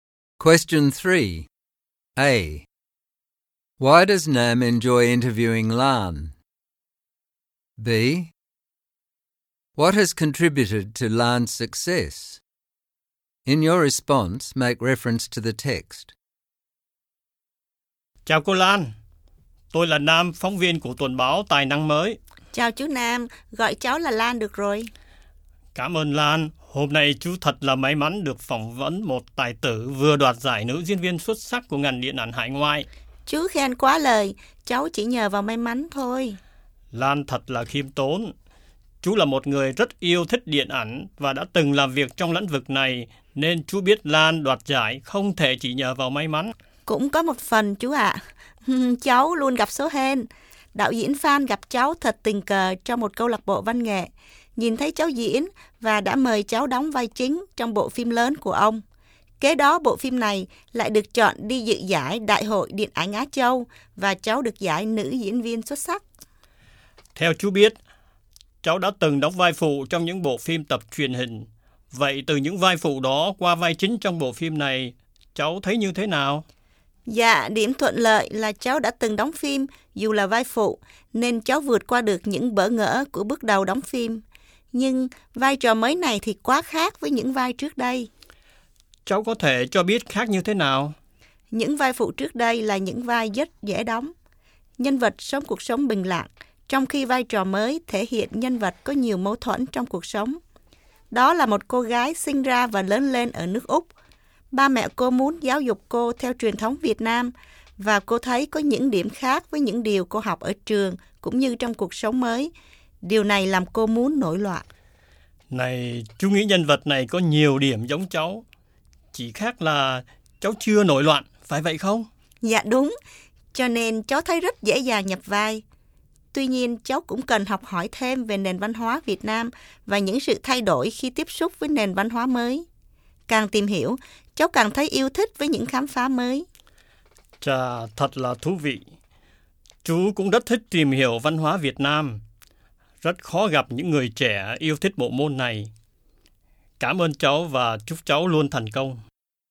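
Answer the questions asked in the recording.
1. She has just won best actress, she is modest, and she shares his interest in Vietnamese culture, which is rare among young people
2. Luck (director Phan discovered her by chance), experience from her supporting roles in TV series, a character similar to herself, and the effort she put into learning about Vietnamese culture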